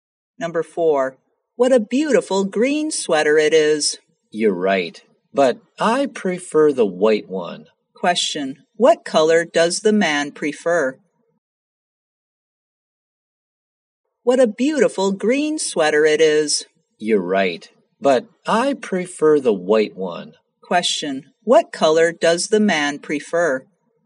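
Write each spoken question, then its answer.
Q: What color does the man prefer?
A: White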